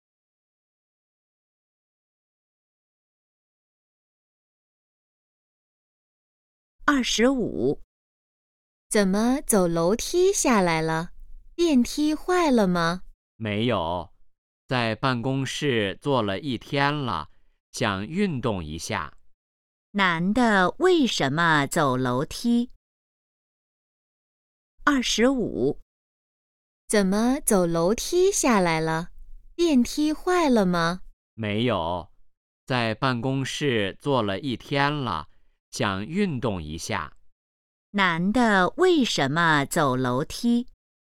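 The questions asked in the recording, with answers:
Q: 男的为什么走楼梯?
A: 想运动一下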